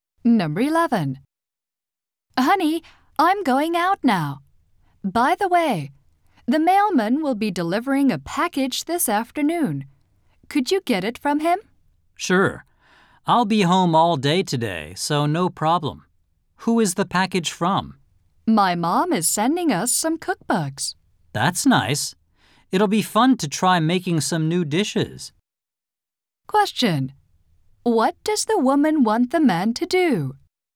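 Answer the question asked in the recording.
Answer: Get the package from the mailman this afternoon.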